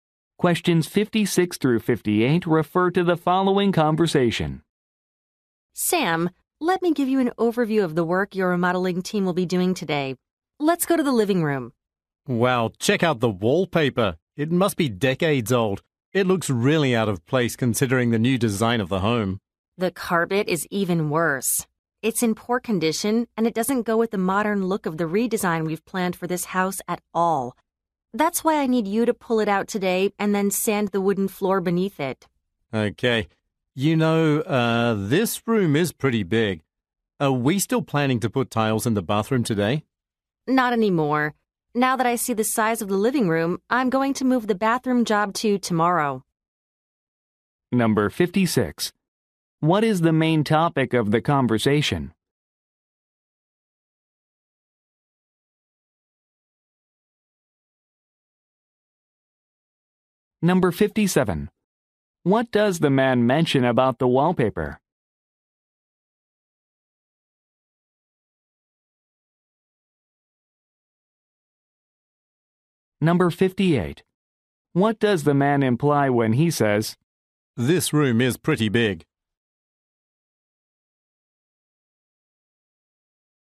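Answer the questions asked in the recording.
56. Remodeling work on a house
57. It is decades old and looks out of place
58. The living room work will take a long time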